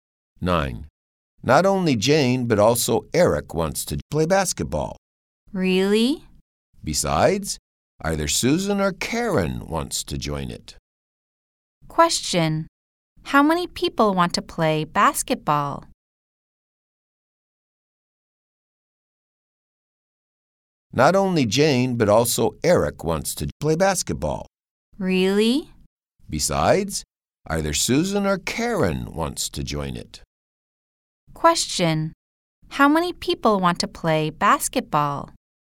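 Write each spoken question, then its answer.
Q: Question. How many people want to play basketball?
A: Three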